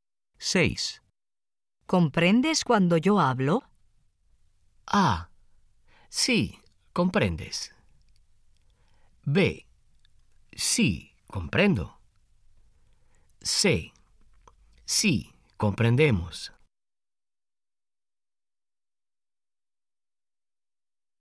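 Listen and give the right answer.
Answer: B: Sí, comprendo.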